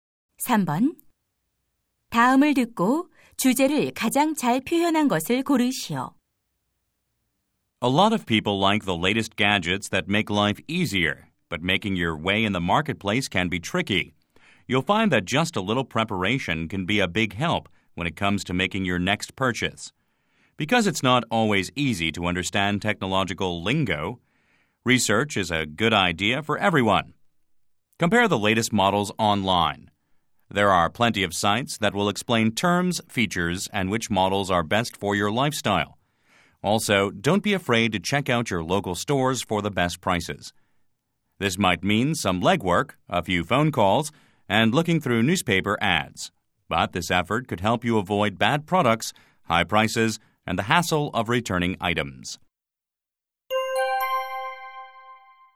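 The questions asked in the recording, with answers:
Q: 다음을 듣고 주제를 가장 잘 표현한 것을 고르시오.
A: 전자제품 구매 전 조사와 비교의 중요성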